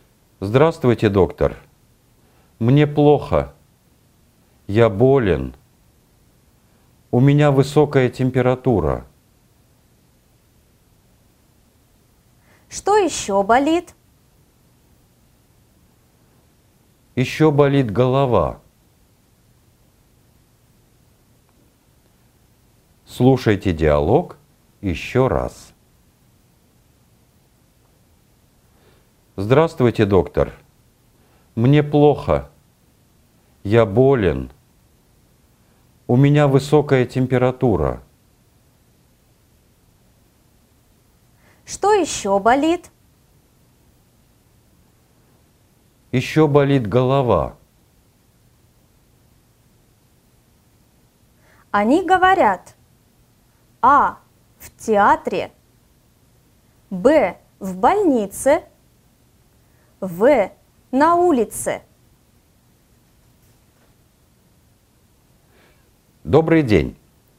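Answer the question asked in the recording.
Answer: Б: В больнице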